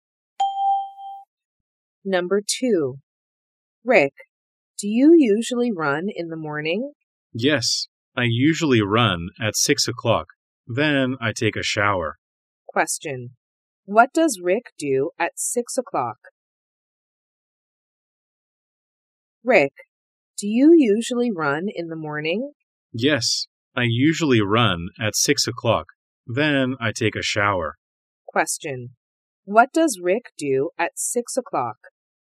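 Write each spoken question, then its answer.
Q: What does Rick do at 6 o'clock?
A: He runs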